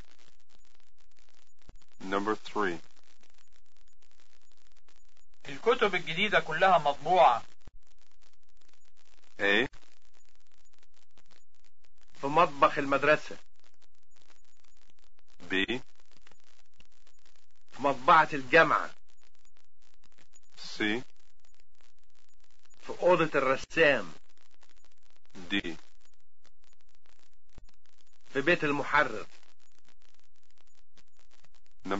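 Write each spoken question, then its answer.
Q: الكتب الجديدة كلها مطبوعة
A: B: في مطبعة الجامعة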